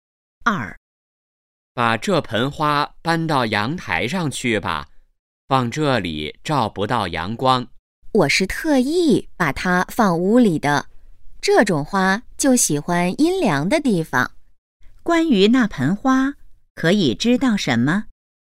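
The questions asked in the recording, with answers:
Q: 关于那盆花,可以知道什么?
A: 喜欢阴凉的地方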